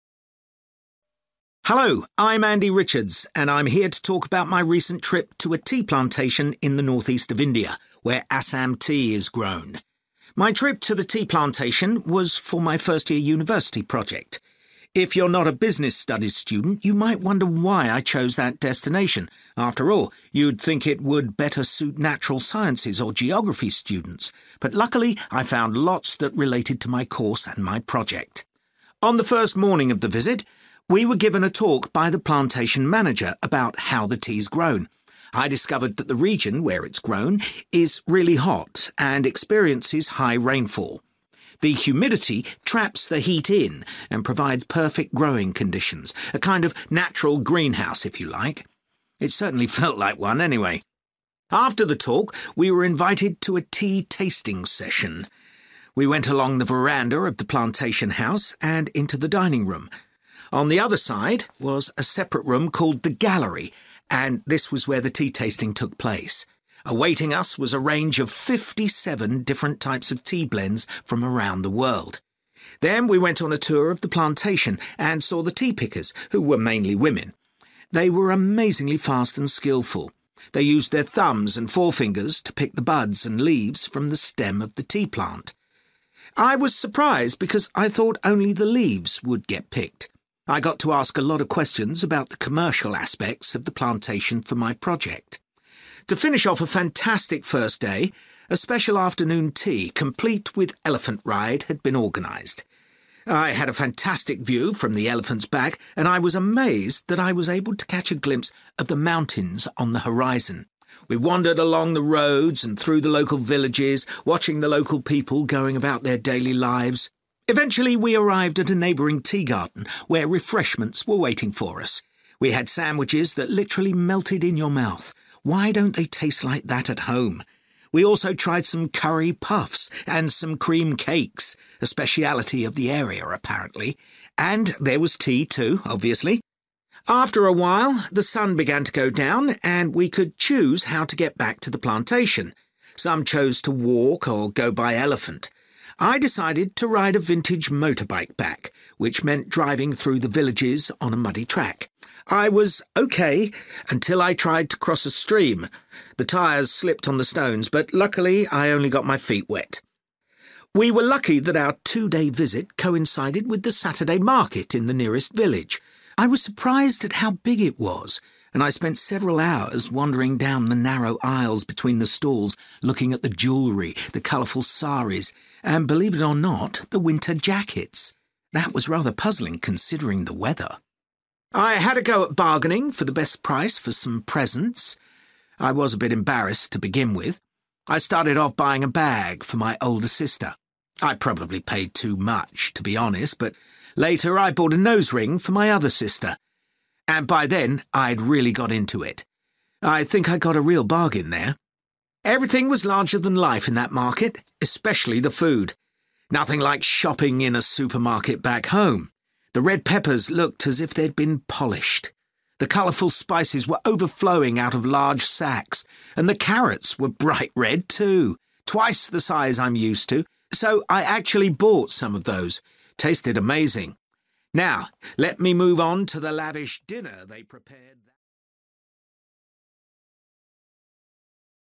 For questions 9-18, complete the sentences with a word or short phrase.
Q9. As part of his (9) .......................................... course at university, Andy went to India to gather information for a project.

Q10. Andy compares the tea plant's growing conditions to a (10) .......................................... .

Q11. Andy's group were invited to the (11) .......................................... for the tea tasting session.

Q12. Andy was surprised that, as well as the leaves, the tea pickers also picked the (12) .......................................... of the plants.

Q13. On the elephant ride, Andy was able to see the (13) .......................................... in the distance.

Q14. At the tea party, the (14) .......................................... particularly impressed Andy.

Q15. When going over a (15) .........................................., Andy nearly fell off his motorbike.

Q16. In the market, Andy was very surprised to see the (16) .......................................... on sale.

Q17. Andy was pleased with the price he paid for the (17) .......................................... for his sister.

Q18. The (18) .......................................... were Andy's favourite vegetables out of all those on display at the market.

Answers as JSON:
{"9": "business (studies)", "10": "(natural) green(-)house", "11": "gallery", "12": "bud(s)", "13": "mountains", "14": "sandwiches", "15": "stream", "16": "winter jackets", "17": "nose(-)ring", "18": "carrots"}

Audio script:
Hello, I'm Andy Richards and I'm here to talk about my recent trip to a tea plantation in the north-east of India, where Assam tea is grown.
My trip to the tea plantation was for my first year university project. If you're not a business studies student, you might wonder why I chose that destination – after all, you'd think it would better suit natural sciences or geography students – but luckily I found lots that related to my course and my project.
On the first morning of the visit, we were given a talk by the plantation manager about how the tea's grown. I discovered that the region where it's grown is really hot and experiences high rainfall. The humidity traps the heat in and provides perfect growing conditions – a kind of natural greenhouse if you like. It certainly felt like one anyway!
After the talk, we were invited to a tea tasting session. We went along the veranda of the plantation house and into the dining room. On the other side was a separate room called the gallery and this was where the tea tasting took place. Awaiting us was a range of fifty-seven different types of tea blends from around the world.
Then, we went on a tour of the plantation and saw the sea pickers who were mainly women. They were amazingly fast and skilful. They used their thumbs and forefingers to pick the buds and leaves from the stem of the tea plant. I was surprised because I thought only the leaves would get picked. I got to ask a lot of questions about the commercial aspects of the plantation for my project.
To finish off a fantastic first day, a special afternoon tea complete with elephant ride had been organised. I had a fantastic view from the elephant's back and I was amazed that I was able to catch a glimpse of the mountains on the horizon. We wandered along the roads and through the local villages, watching the local people going about their daily lives.
Eventually, we arrived at a neighbouring tea garden where refreshments were waiting for us. We had sandwiches that literally melted in your mouth – why don't they taste like that at home? We also tried some curry puffs and some cream cakes ... a speciality of the area apparently. And there was tea too obviously!
After a while, the sun began to go down and we could choose how to get back to the plantation. Some chosen to walk or go by elephant. I decided to ride a vintage motorbike back, which meant driving through the villages on a muddy track. I was OK until I tried to cross a stream. The tyres slipped on the stones, but luckily I only got my feet wet!
We were lucky that our two-day visit coincided with the Saturday market in the nearest village. I was surprised at how big it was and I spent several hours wandering down the narrow aisles between the stalls looking at the jewellery, the colourful saris and believe it or not – the winter jackets! That was rather puzzling considering the weather!
I had a go at bargaining for the best price for some presents. I was a bit embarrassed to begin with. I started off buying a bag for my older sister. I probably paid too much to be honest but later I bought a nose ring for my other sister – and by then I'd really got into it! I think I got a real bargain there!
Everything was larger than life in that market – especially the food ... nothing like shopping in a supermarket back home. The red poppers looked as if they'd been polished, the colourful spices ere overflowing out of large sacks and the carrots were bright red too, twice the size I'm used to, so I actually bought some of those – tasted amazing.
Now let me move on to the lavish dinner they prepared.